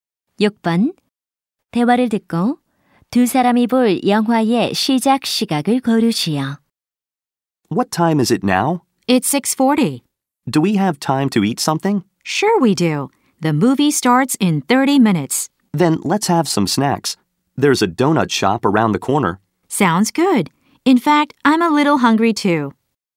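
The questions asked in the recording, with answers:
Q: 대화를 듣고 두 사람이 볼 영화의 시작 시각을 고르시오.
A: 7시 10분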